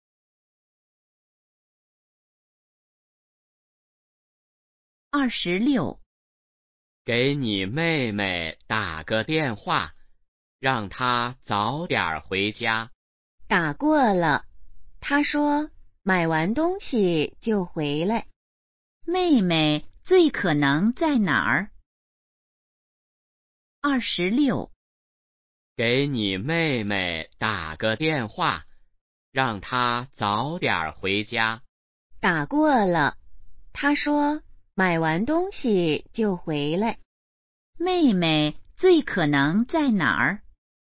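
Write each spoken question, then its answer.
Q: 妹妹最可能在哪儿?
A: 商店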